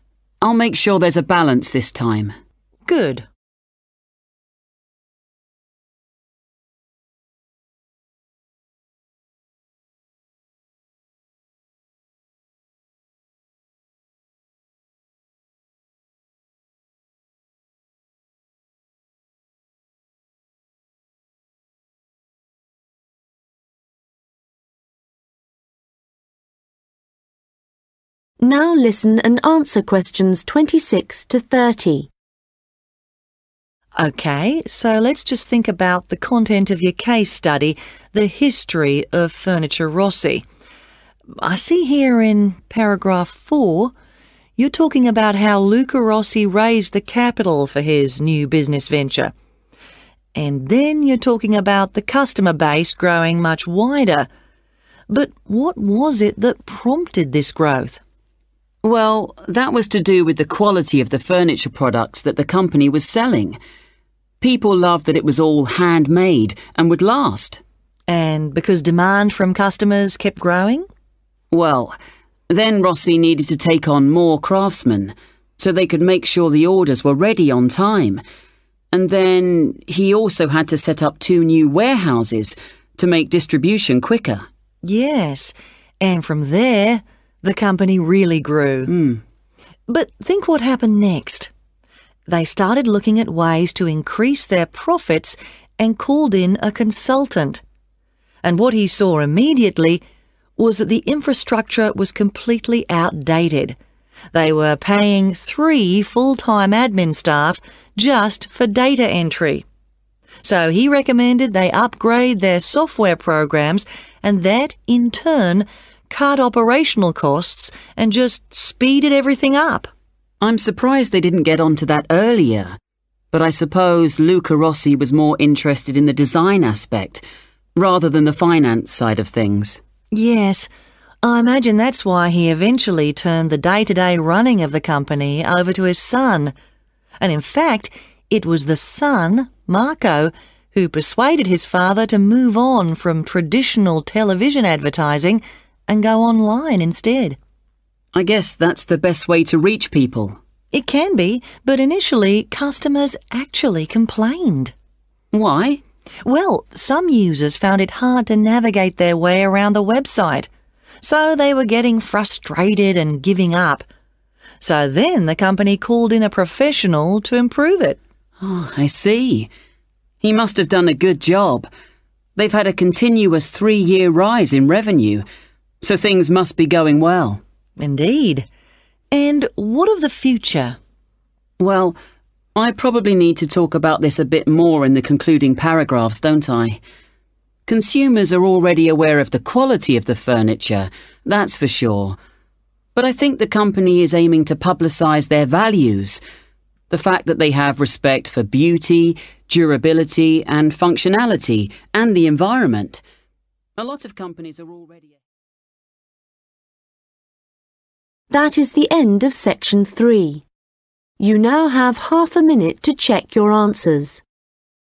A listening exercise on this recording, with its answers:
Questions 26-30 Complete the flow-chart below. Choose FIVE answers from the list below and write the correct letter, A-G, next to Questions 26-30.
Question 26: Chỗ trống 26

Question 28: Chỗ trống 28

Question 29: Chỗ trống 29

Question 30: Chỗ trống 30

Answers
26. (E) quality
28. (G) software programs
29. (A) website
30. (F) values

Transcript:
Tutor: Good. Okay, so let's just think about the content of your case study the history of furniture Rossi. I see here in paragraph four, you're talking about how Luca Rossi raised the capital for his new business venture. And then you're talking about the customer base growing much wider (= a wider customer base). But what was it that prompted this growth?
James: (Q26) Well, that was to do with the quality of the furniture products that the company was selling.
Tutor: And because demand from customers kept growing (= greater customer demand)?
James: (Q27) Well, then Rossi needed to take on more craftsmen so they could make sure the orders were ready on time.
Tutor: Yes, and from there the company really grew. But I think what happened next? They started looking at ways to increase their profits (= increased overall profitability) and called in a consultant. And what he saw immediately was that the infrastructure was completely outdated. They were paying three full-time admin staff just for data entry.
James: I'm surprised they didn't get onto that earlier, but I suppose Luca Rossi was more interested in the design aspect rather than the finance side of things.
Tutor: Yes, I imagine that's why he eventually turned the day-to-day running of the company over to his son. And in fact, it was the son Marco who persuaded his father to move on from traditional television advertising and go online instead.
James: I guess that's the best way to reach people.
Tutor: It can be but initially customers actually complained.
James: Why?
So then the company called in a professional to improve it.
James: Oh, I see. He must have done a good job. They've had a continuous three-year rise in revenue, so things must be going well.
Tutor: Indeed and what of the future?
James: Well, I probably need to talk about this a bit more in the concluding paragraphs, don't I? Consumers are already
aware of the quality of the furniture, that's for sure. The fact that they have respect for beauty, durability, and functionality, and the environment. Lots of companies are already...